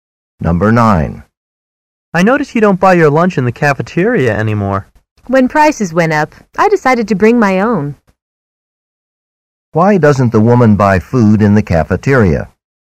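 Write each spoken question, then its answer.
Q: Why doesn't the woman buy food in the cafeteria?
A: Prices went up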